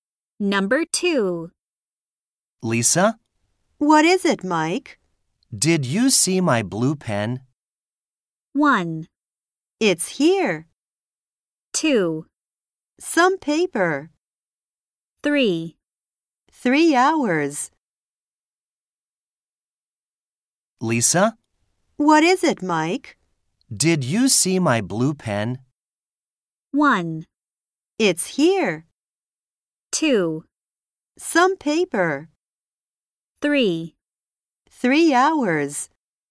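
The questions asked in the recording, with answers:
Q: Did you see my blue pen?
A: 1: It's here.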